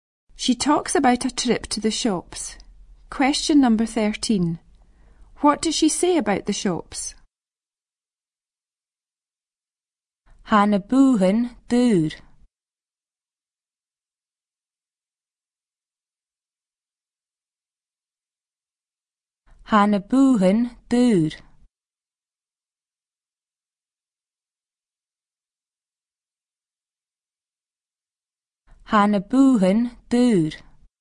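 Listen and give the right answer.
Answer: They were expensive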